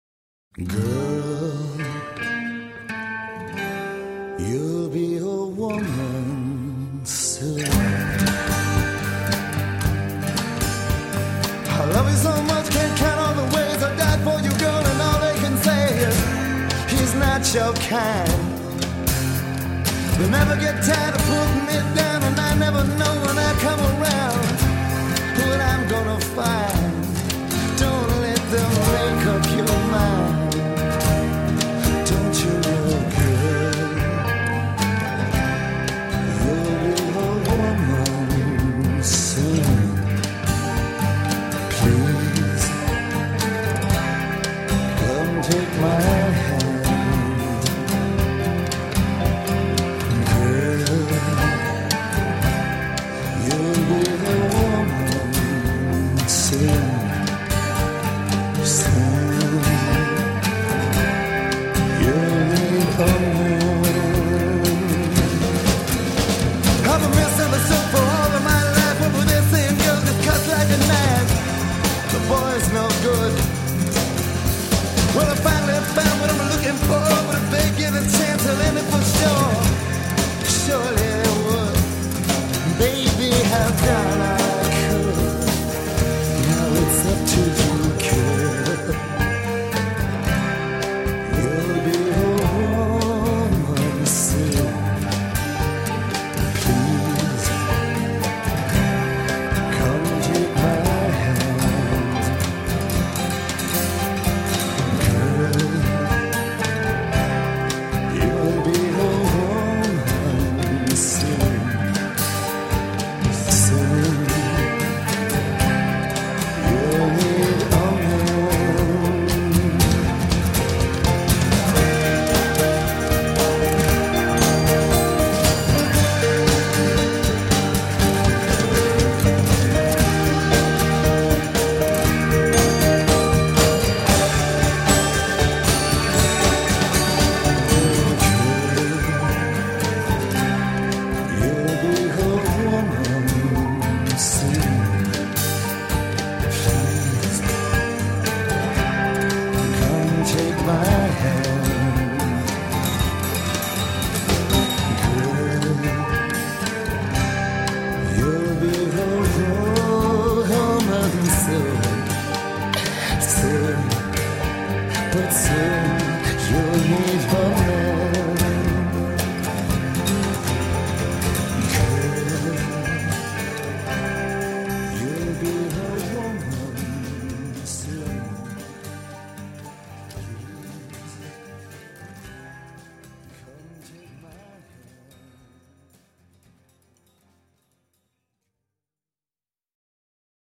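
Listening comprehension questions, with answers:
Заполните пропущенные слова в тексте песни.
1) I love you so , can't count all the ways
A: much

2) And I'll never when I come around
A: know

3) Don't let make up your mind.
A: them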